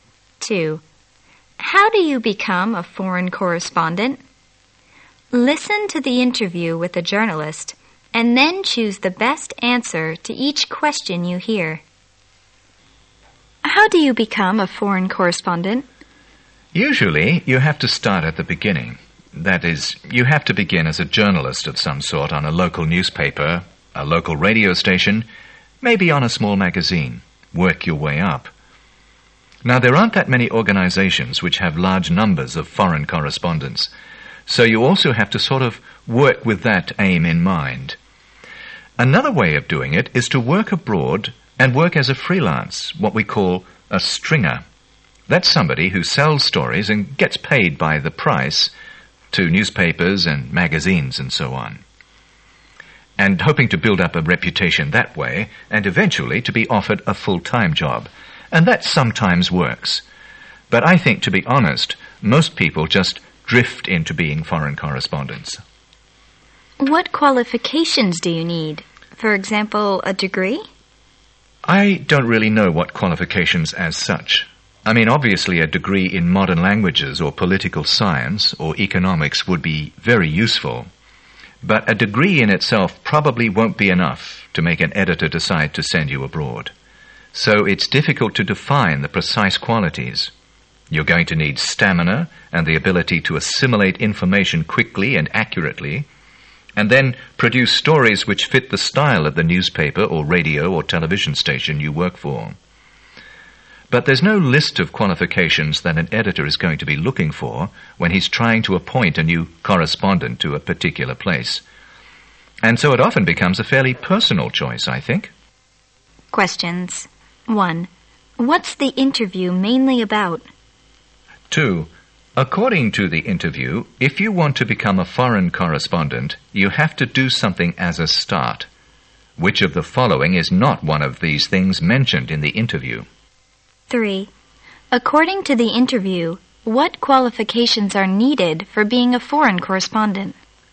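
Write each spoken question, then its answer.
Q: What's the interview mainly about?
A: How to become a foreign correspondent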